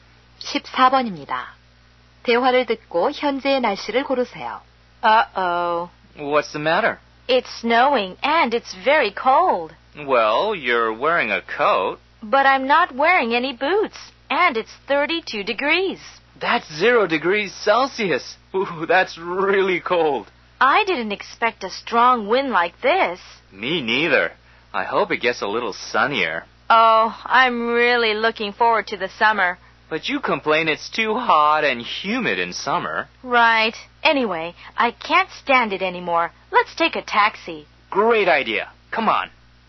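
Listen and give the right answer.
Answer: 눈이 오고 바람이 불며 추움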